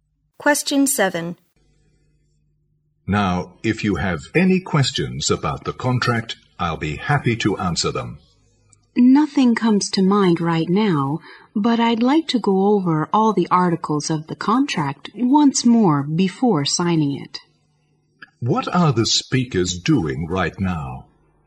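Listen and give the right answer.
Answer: Discussing a contract before signing it.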